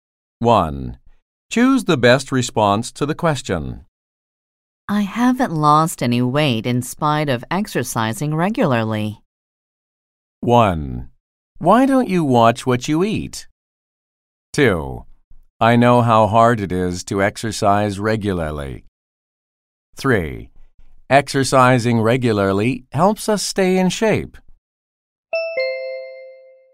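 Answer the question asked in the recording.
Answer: 1: Why don't you watch what you eat?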